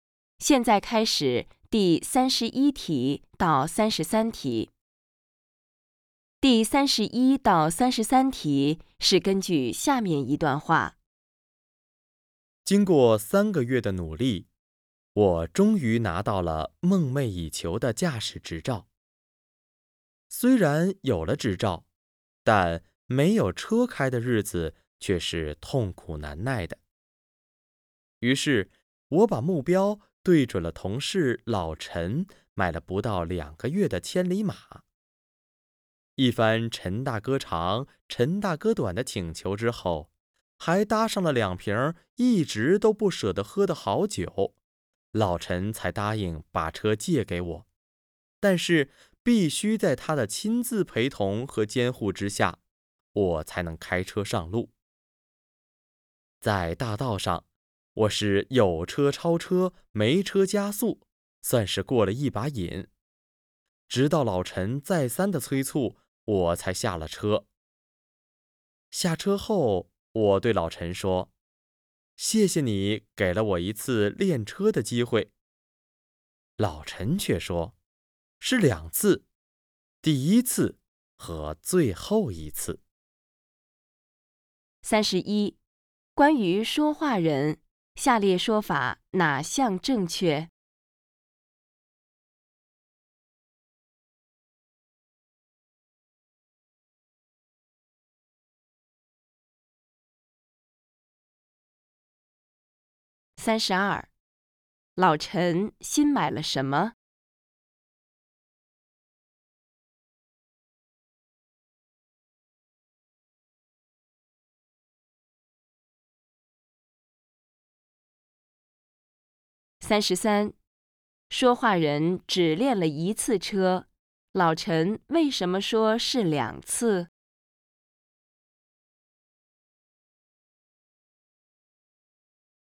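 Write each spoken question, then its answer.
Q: 老陈新买了什么?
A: 车(千里马)

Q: 说话人只练了一次车,老陈为什么说是两次?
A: 这是第一次也是最后一次,以后不会再借车给他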